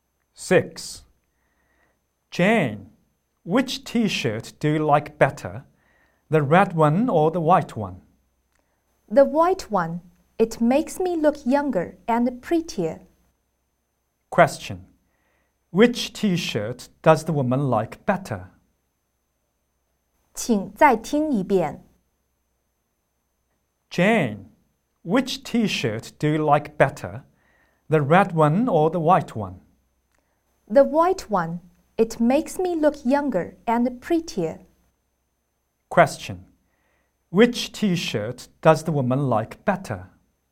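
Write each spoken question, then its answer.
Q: Which T-shirt does the woman like better?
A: The white one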